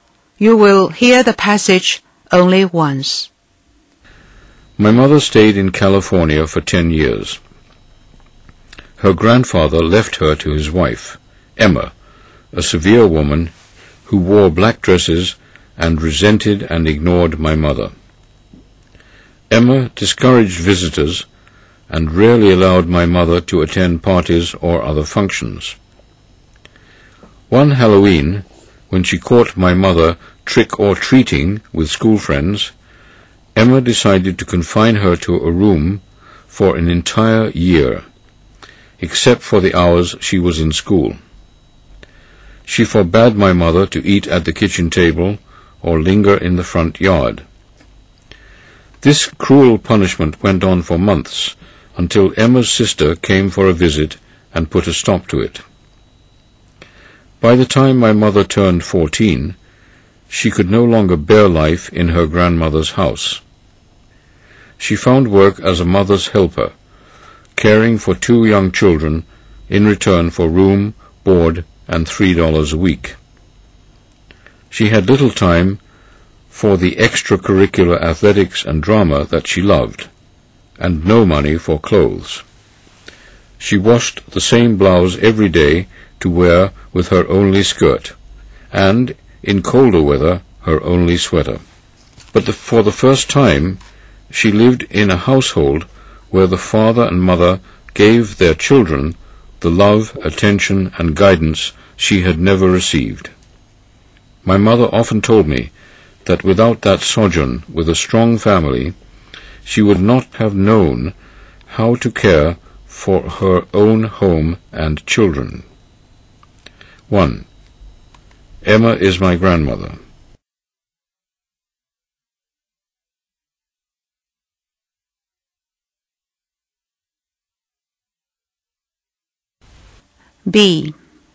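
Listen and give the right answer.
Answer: False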